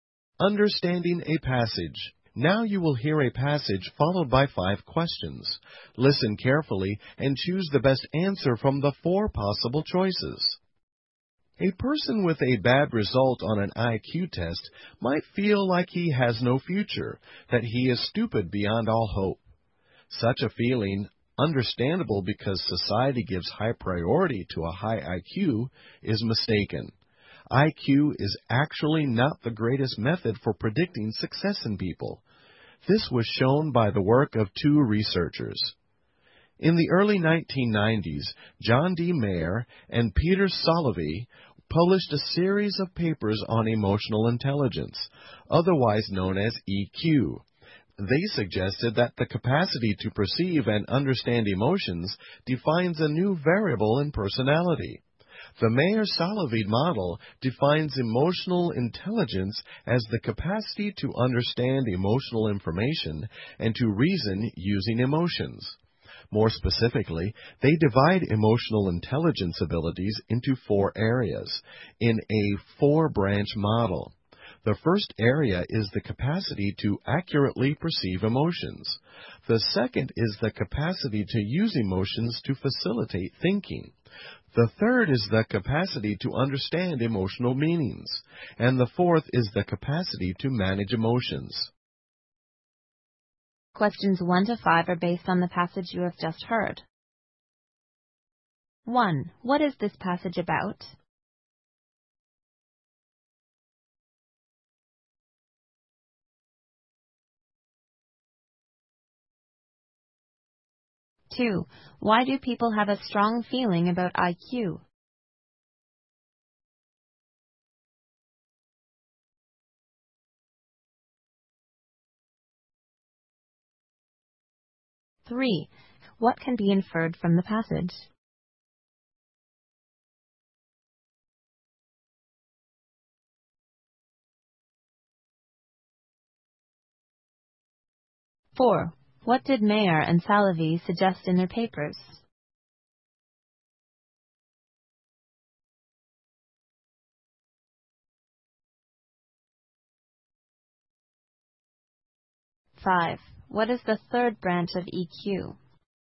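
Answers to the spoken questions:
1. Emotional intelligence (EQ) as a better predictor of success than IQ
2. Because society gives high priority to a high IQ
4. That the capacity to perceive and understand emotions defines a new personality variable
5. The capacity to understand emotional meanings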